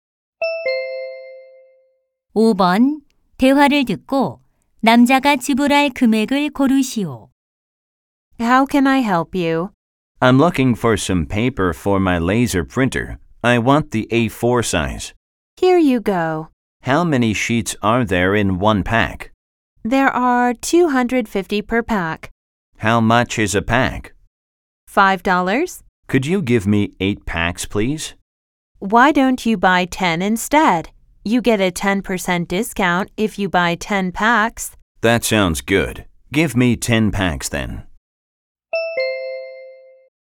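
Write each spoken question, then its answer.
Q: 대화를 듣고 남자가 지불할 금액을 고르시오.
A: 45달러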